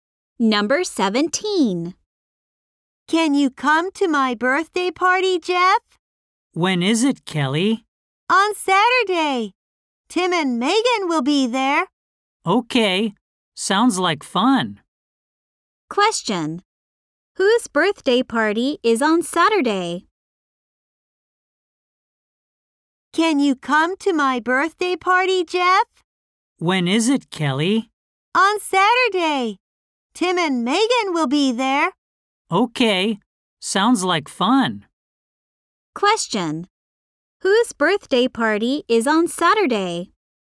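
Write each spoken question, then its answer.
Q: Whose birthday party is on Saturday?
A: Kelly's.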